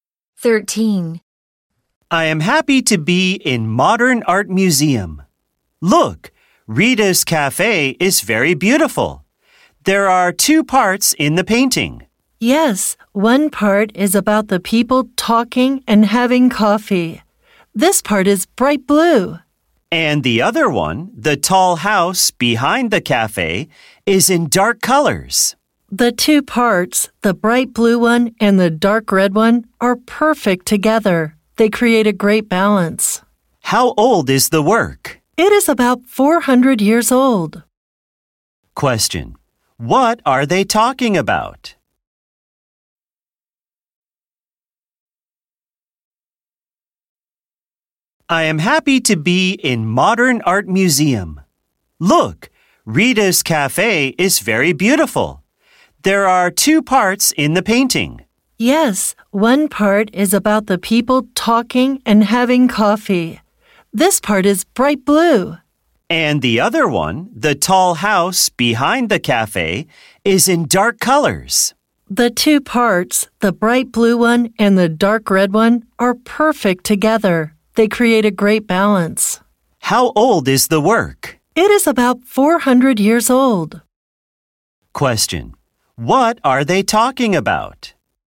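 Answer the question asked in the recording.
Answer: A painting (Rita's cafe)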